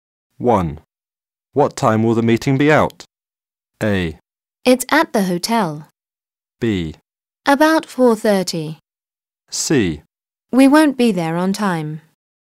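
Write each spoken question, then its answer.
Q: What time will the meeting be out?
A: B: About 4:30.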